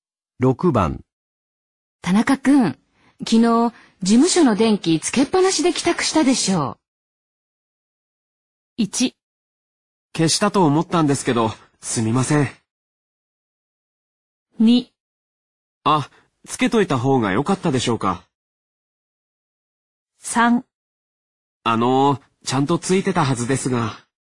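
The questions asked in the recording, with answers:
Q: 田中くん、昨日、事務所の電気つけっぱなしで帰宅したでしょう。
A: 1: 消したと思ったんですけど、すみません。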